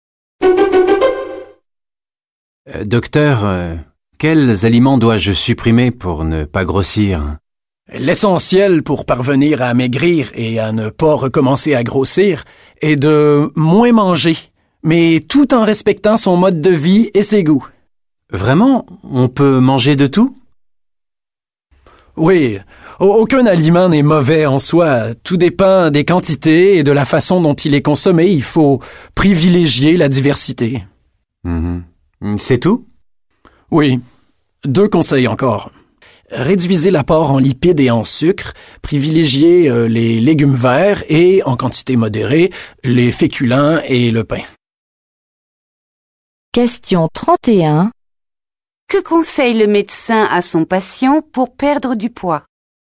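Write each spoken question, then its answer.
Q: Que conseille le médecin à son patient pour perdre du poids?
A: Manger moins et varié, réduire lipides et sucres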